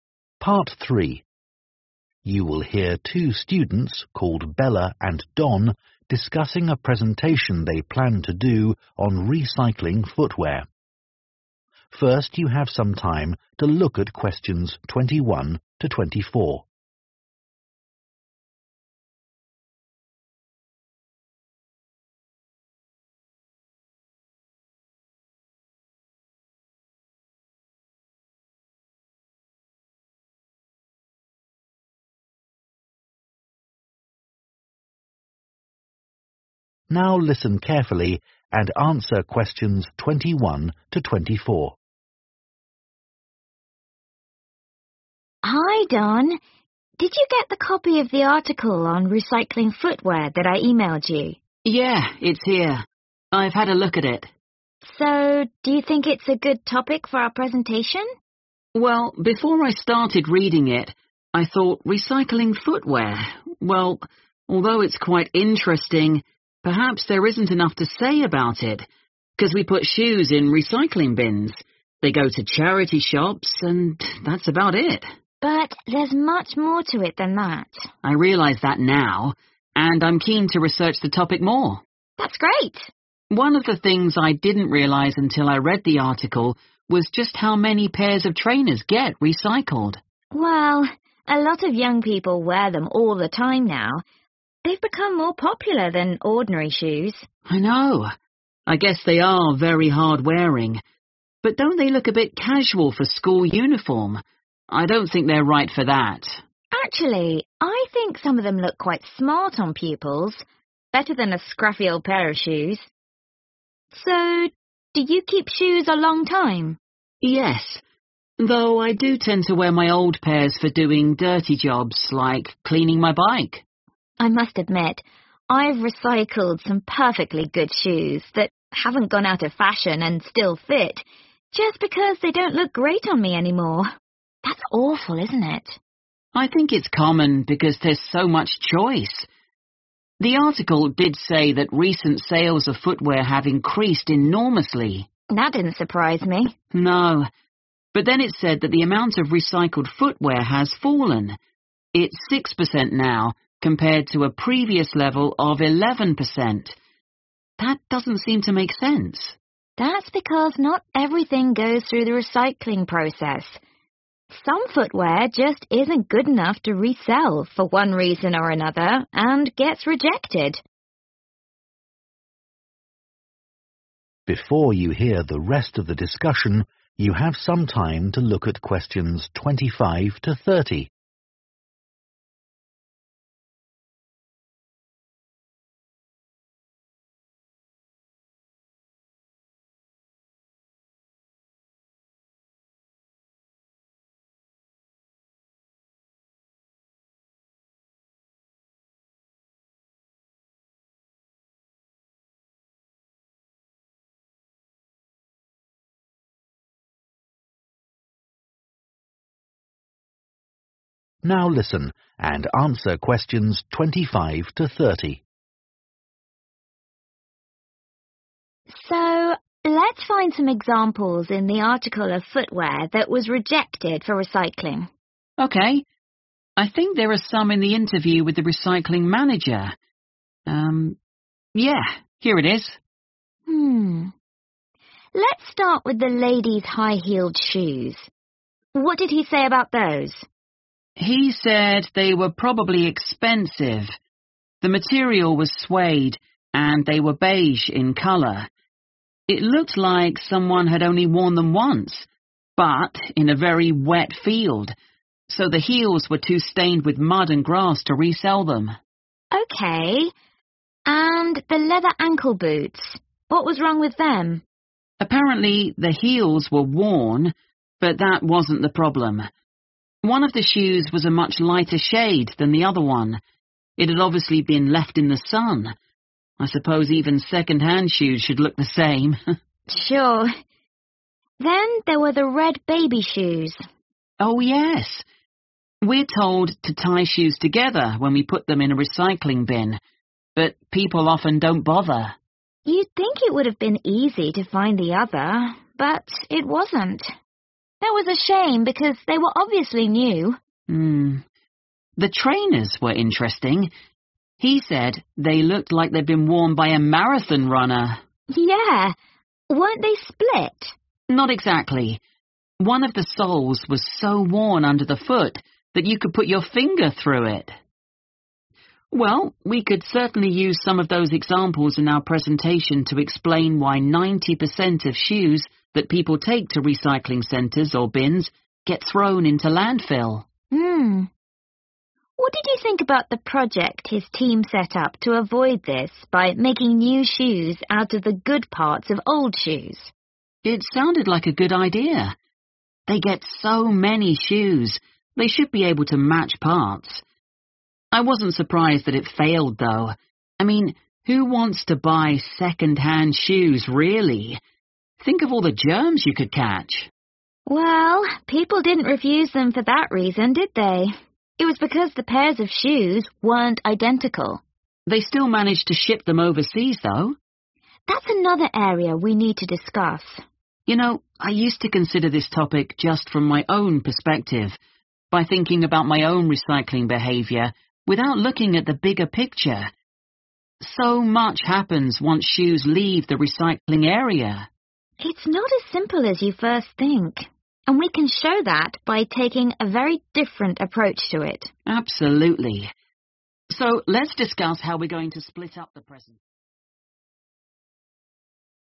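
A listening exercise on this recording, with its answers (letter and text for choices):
choose the correct letter, A, B or C.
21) At first, Don thought the topic of recycling footwear might be too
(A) limited in scope.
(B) hard to research.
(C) boring for listeners.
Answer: (A) limited in scope.

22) When discussing trainers, Bella and Don disagree about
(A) how popular they are among young people.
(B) how suitable they are for school.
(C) how quickly they wear out.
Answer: (B) how suitable they are for school.

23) Bella says that she sometimes recycles shoes because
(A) they no longer fit.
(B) she no longer likes them.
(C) they are no longer in fashion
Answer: (B) she no longer likes them.

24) What did the article say that confused Don?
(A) Public consumption of footwear has risen.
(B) Less footwear is recycled now than in the past.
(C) People dispose of more footwear than they used to.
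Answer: (B) Less footwear is recycled now than in the past.

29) why did the project to make 'new' shoes out of old shoes fail?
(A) People believed the 'new' pairs of shoes were unhygienic.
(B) There were not enough good parts to use in the old shoes.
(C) The shoes in the 'new' pairs were not completely alike.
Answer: (C) The shoes in the 'new' pairs were not completely alike.

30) Bella and Don agree that they can present thair topic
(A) from a new angle.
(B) With relevant images.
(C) in a straightforward way.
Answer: (A) from a new angle.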